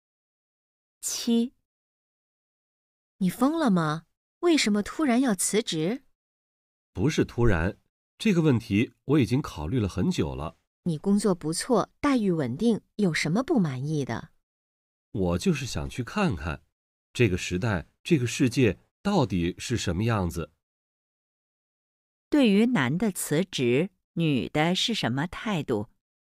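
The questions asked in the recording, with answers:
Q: 对于男的辞职,女的是什么态度?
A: 不理解,反对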